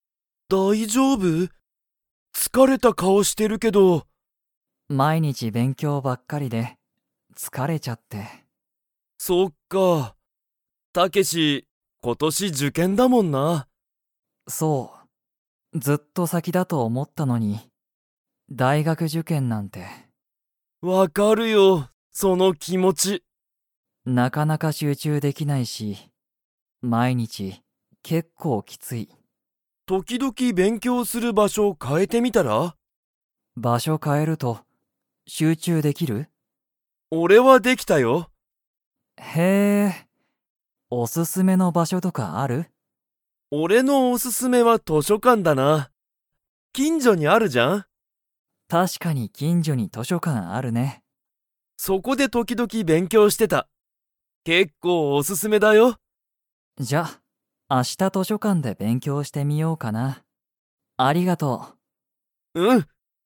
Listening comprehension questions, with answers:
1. タケシは勉強(べんきょう)に集中(しゅうちゅう)できていますか?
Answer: いいえ

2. ケントの勉強(べんきょう)におすすめの場所(ばしょ)はどこですか?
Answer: 図書館(としょかん)

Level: Level 4